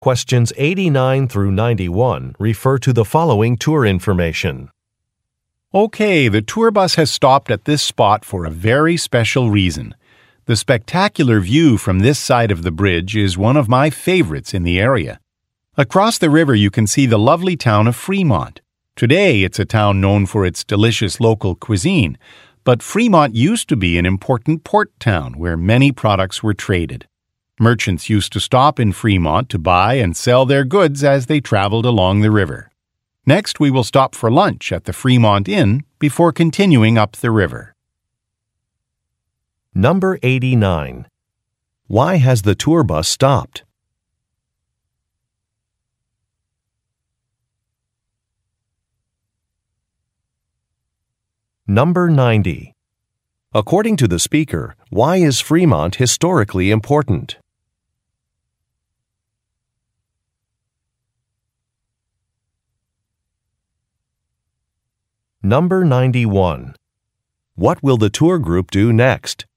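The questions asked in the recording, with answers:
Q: Why has the tour bus stopped?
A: To see the spectacular view from the bridge

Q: According to the speaker, why is Fremont historically important?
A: It used to be an important port town where many products were traded

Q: What will the tour group do next?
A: Stop for lunch at the Fremont Inn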